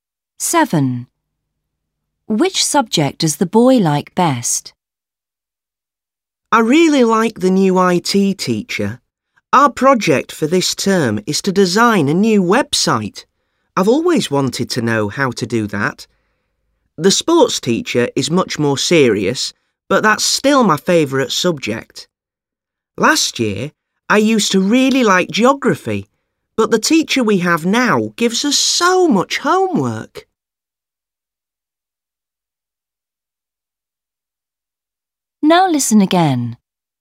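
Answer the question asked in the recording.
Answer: sport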